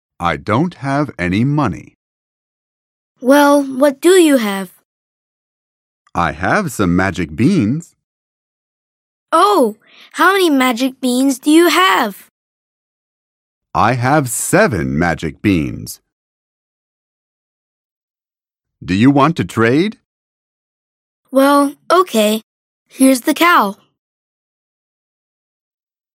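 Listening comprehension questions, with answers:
«باتوجه به فایل صوتی جملات را به ترتیب بنویسید»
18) Match.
I don't have any money. / Well, what do you have? / I have some magic beans. / Oh! How many magic beans do you have? / I have seven magic beans. / Do you want to trade? / Well, OK. Here's the cow.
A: I don't have any money. / Well, what do you have? / I have some magic beans. / Oh! How many magic beans do you have? / I have seven magic beans. / Do you want to trade? / Well, OK. Here's the cow.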